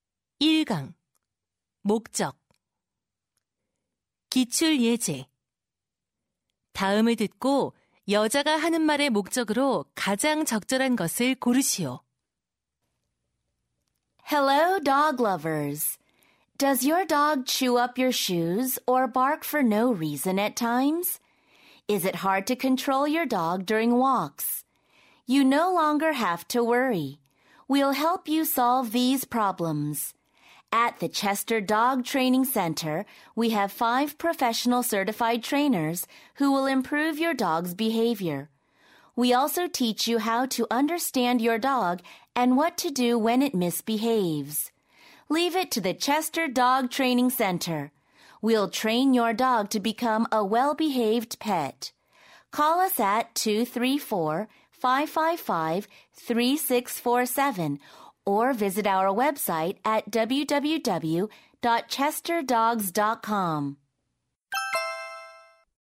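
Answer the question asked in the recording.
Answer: 반려견 훈련 센터를 홍보하려고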